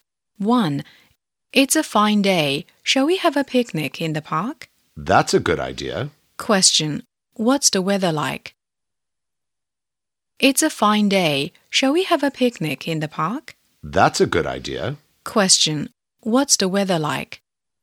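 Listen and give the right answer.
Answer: It's fine.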